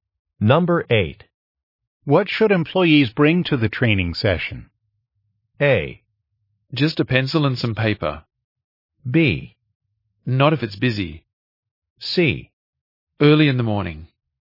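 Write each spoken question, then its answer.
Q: What should employees bring to the training session?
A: A: Just a pencil and some paper.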